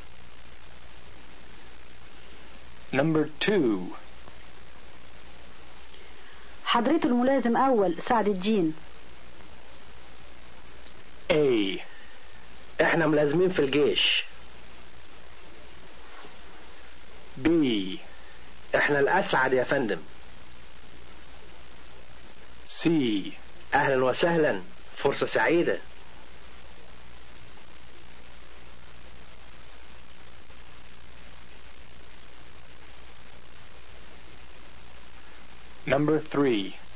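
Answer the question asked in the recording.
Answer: C: اهلا وسهلا، فرصة سعيدة.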